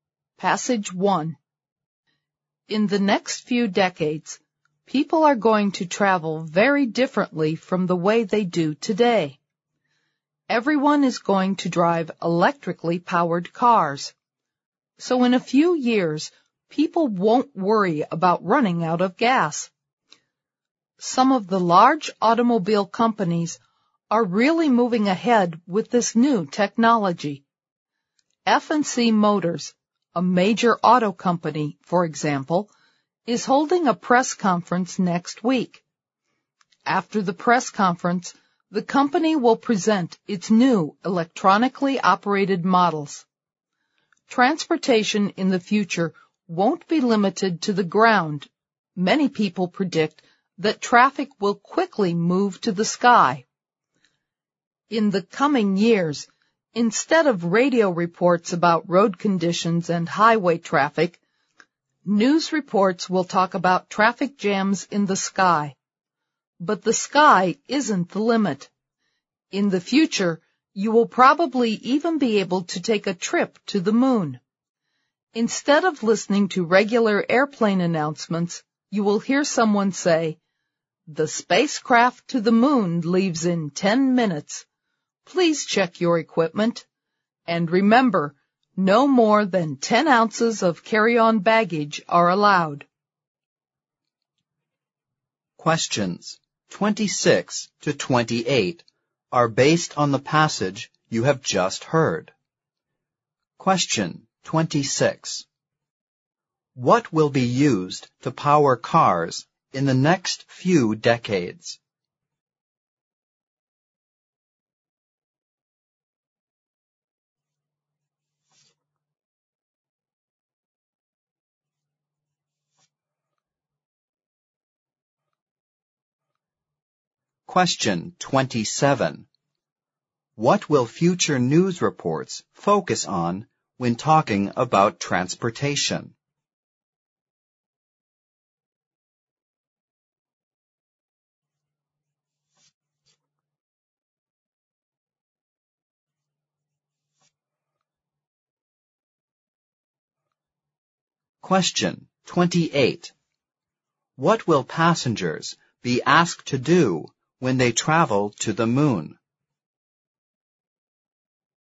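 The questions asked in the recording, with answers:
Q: What will be used to power cars in the next few decades?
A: Electricity

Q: What will future news reports focus on when talking about transportation?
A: Traffic jams in the sky

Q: What will passengers be asked to do when they travel to the moon?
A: Check their equipment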